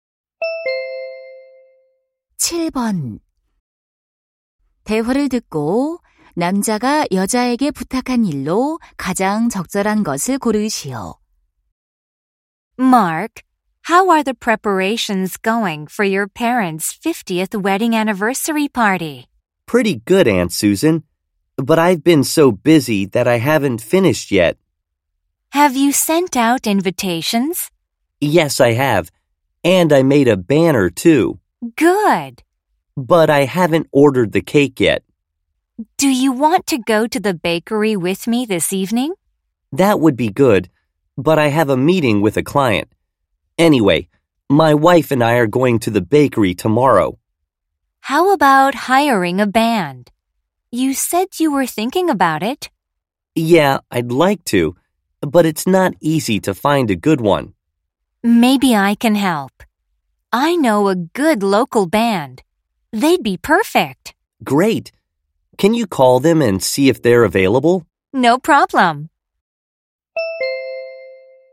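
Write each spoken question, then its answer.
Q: 대화를 듣고 남자가 여자에게 부탁한 일로 가장 적절한 것을 고르시오.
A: 밴드에 연락해서 가능한지 알아보기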